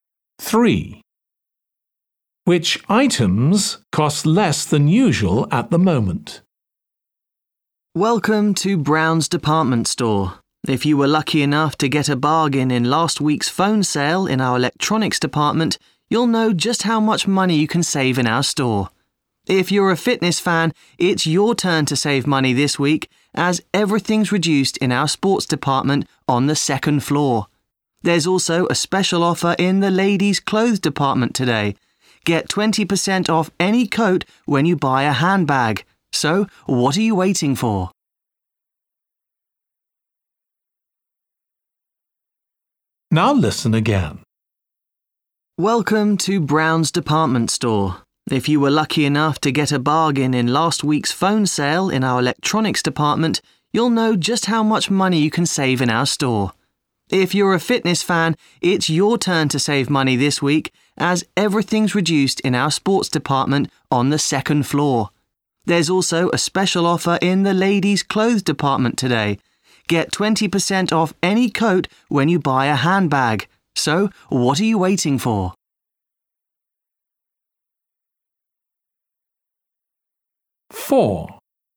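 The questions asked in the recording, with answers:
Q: Which items cost less than usual at the moment?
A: sports items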